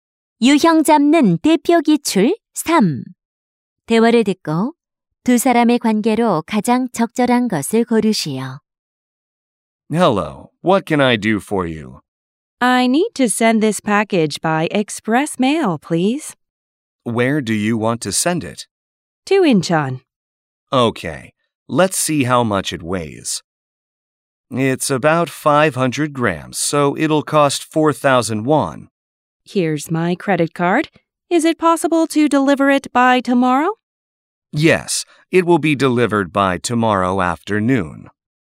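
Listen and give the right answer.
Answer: 우체국 직원 - 고객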